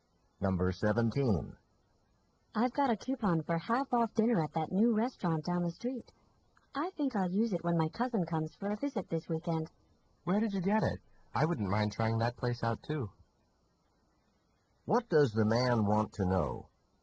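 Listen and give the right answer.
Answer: Where the woman got the coupon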